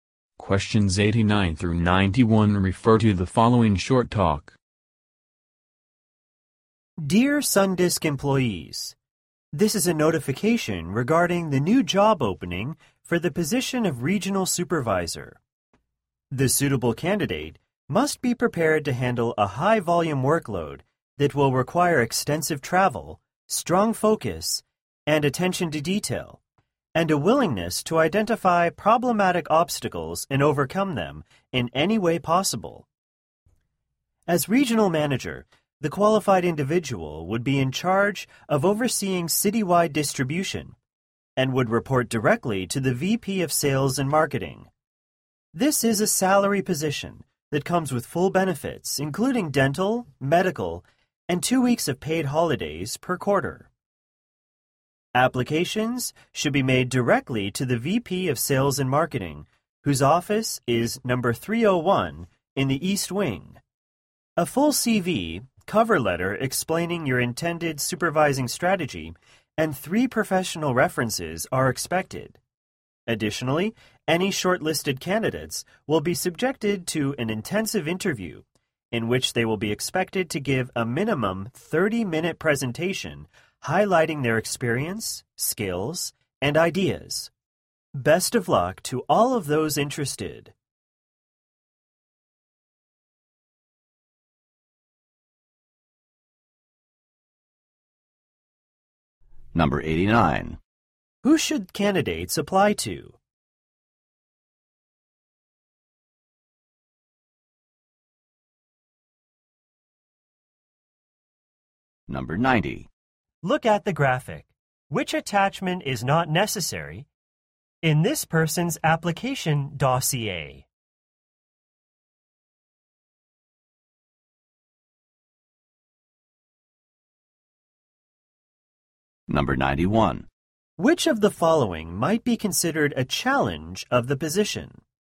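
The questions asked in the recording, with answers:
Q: Who should candidates apply to?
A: The VP of Sales and Marketing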